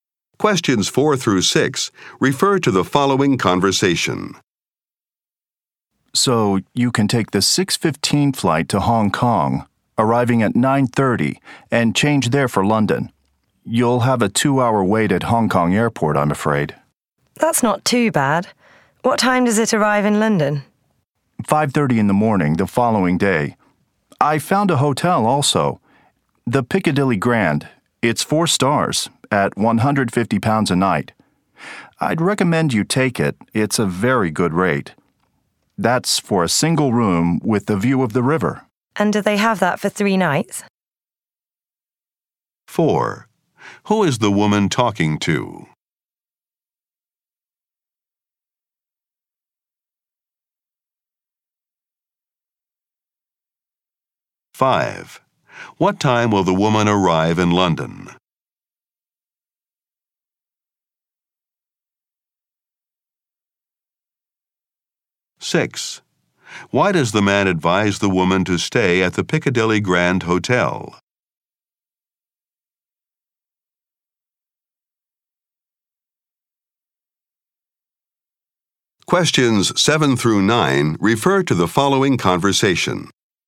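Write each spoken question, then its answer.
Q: Who is the woman talking to?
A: A travel agent

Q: What time will the woman arrive in London?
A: 5:30 in the morning the following day

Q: Why does the man advise the woman to stay at the Piccadilly Grand Hotel?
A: It's a very good rate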